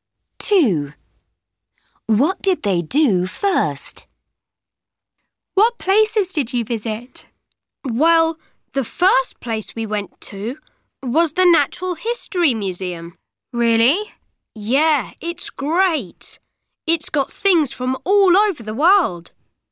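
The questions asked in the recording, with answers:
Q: What did they do first?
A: Visited the Natural History Museum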